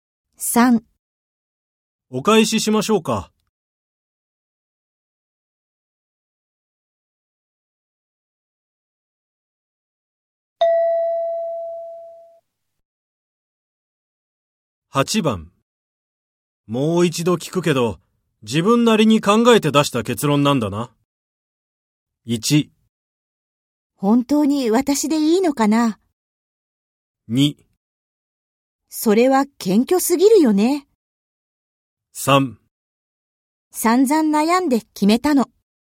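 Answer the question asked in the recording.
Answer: 3: 散々悩んで決めたの。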